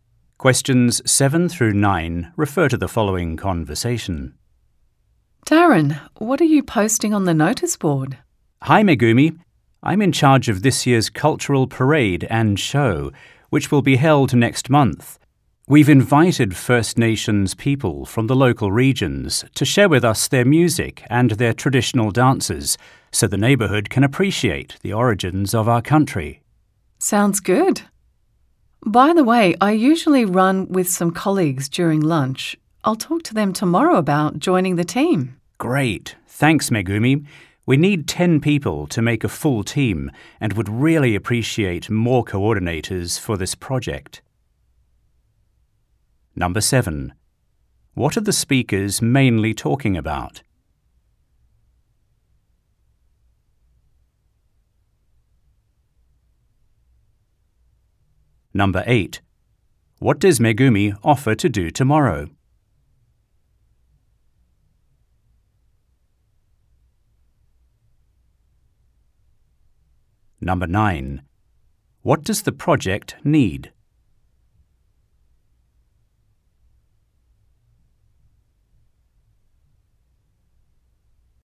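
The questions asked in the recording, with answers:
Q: What are the speakers mainly talking about?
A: An upcoming cultural parade and show

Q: What does Megumi offer to do tomorrow?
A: Talk to her colleagues about joining the team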